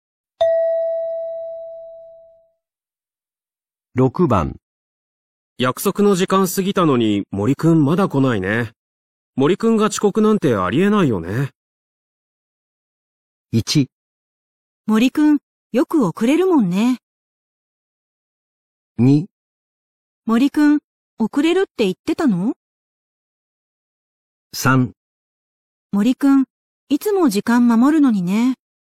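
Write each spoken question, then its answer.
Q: 約束の時間過ぎたのに森くんまだ来ないね。森くんが遅刻なんてありえないよね。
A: 3: 森くんいつも時間守るのにね。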